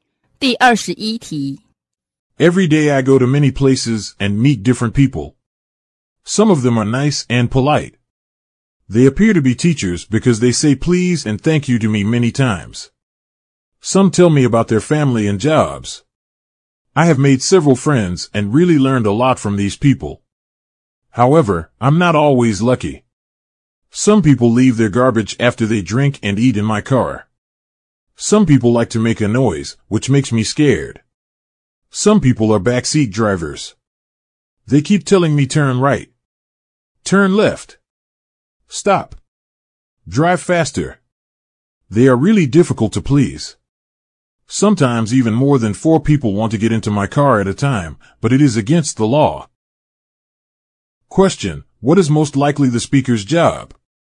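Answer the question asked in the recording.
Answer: A taxi driver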